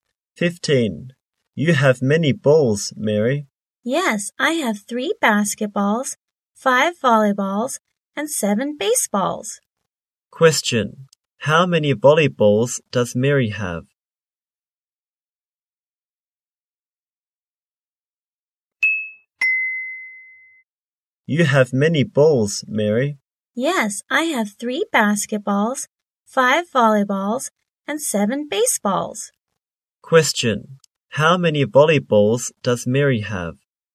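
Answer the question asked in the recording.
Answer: Five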